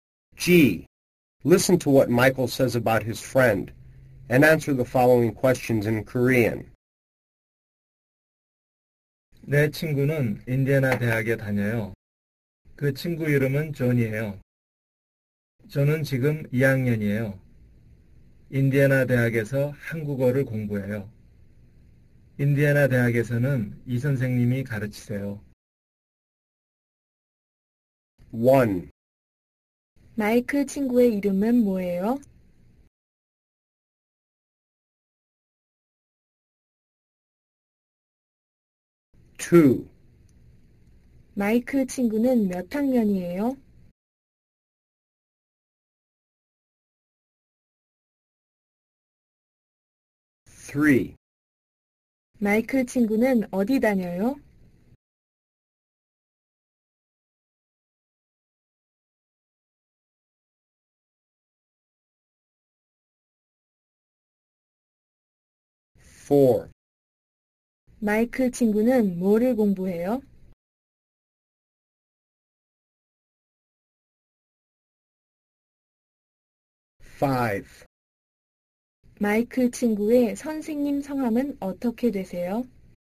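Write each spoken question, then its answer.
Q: 마이클 친구의 이름은 뭐예요?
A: 존이에요

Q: 마이클 친구는 어디 다녀요?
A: 인디애나 대학에 다녀요

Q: 마이클 친구는 뭐를 공부해요?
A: 한국어를 공부해요

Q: 마이클 친구의 선생님 성함은 어떻게 되세요?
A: 이 선생님이세요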